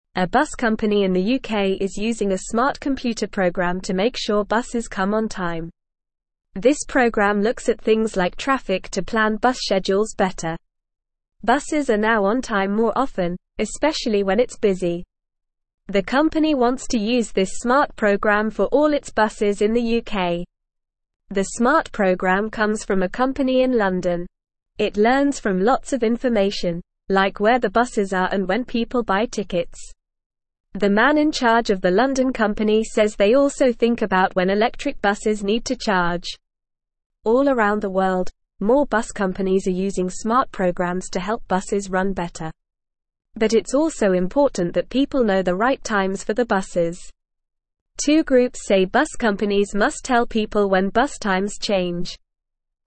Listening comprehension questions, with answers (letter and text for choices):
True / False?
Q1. A bus company in the UK is using a special computer program to make sure buses come on time.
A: True

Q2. More bus companies around the world are using special programs to help buses run better.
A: True

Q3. The company wants to use this special program for all its buses in the UK.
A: True

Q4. The program does not come from a company in London.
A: False

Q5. It does not learn from lots of information, such as where the buses are and when people buy tickets.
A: False

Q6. The man in charge of the London company says they do not think about when electric buses need to charge.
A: False

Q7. The program does not consider things like traffic to plan bus schedules better.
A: False

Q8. Buses are now on time more often, especially when it's busy.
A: True

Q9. What is the smart computer program helping the bus company in the UK?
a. A program that helps people buy tickets for the bus.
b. A program that teaches people how to drive buses.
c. A program that makes sure the buses are clean.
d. A program that looks at traffic and plans bus schedules better.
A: d. A program that looks at traffic and plans bus schedules better.

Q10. What else does the man in charge of the London company think about?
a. When the buses need to be painted.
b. When the drivers need to take a break.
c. When electric buses need to charge.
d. When the buses need new tires.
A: c. When electric buses need to charge.

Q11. Why are more bus companies around the world using smart programs?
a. To help people buy tickets faster.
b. To help buses run better.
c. To help people find their lost belongings on the bus.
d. To help people learn how to drive a bus.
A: b. To help buses run better.

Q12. What do two groups say bus companies must do?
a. Give people free bus tickets.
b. Tell people when bus times change.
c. Teach people how to drive a bus.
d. Make sure the buses are always clean.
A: b. Tell people when bus times change.

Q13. What is the main goal of the smart program?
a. To make sure buses come on time.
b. To make sure people buy tickets.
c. To make sure the buses are clean.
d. To make sure the drivers are happy.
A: a. To make sure buses come on time.

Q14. What is the bus company in the UK planning to do with the smart program?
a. Use it for all its buses in the UK.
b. Use it for all its buses around the world.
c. Use it to teach people how to drive a bus.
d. Use it to make sure the buses are always clean.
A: a. Use it for all its buses in the UK.

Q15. A bus company in the UK is using a smart computer program to make sure (1)______ come on time.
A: buses

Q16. This program looks at things like traffic to (2)______ bus schedules better.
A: plan

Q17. The smart program comes from a company in (3)______.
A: London

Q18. It learns from (4)______ of information, like where the buses are and when people buy tickets.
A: lots

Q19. The man in charge of the London company says they also think about when electric buses (5)______ to charge.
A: need

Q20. All around the (6)______, more bus companies are (7)______ smart programs to help buses run better.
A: world

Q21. All around the (6)______, more bus companies are (7)______ smart programs to help buses run better.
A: using

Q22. Two (8)______ say bus companies must tell people when bus times change.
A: groups

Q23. What is the smart computer program used for?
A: The smart computer program is used to make sure buses come on time.

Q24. How does the smart program help buses be on time?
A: The smart program looks at things like traffic to plan bus schedules better, so the buses can be on time more often.

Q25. Why is it important for bus companies to tell people when bus times change?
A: It's important for bus companies to tell people when bus times change so that people know the right times for the buses.

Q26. What other thing do bus companies think about when using the smart program?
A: Bus companies also think about when electric buses need to charge when using the smart program.

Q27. Are more bus companies around the world using smart programs?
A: Yes, more bus companies around the world are using smart programs to help buses run better.

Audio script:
A bus company in the UK is using a smart computer program to make sure buses come on time. This program looks at things like traffic to plan bus schedules better. The company wants to use this smart program for all its buses in the UK.
The smart program comes from a company in London. It learns from lots of information, like where the buses are and when people buy tickets. The man in charge of the London company says they also think about when electric buses need to charge. All around the world, more bus companies are using smart programs to help buses run better. But it's also important that people know the right times for the buses. Two groups say bus companies must tell people when bus times change.

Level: Level 1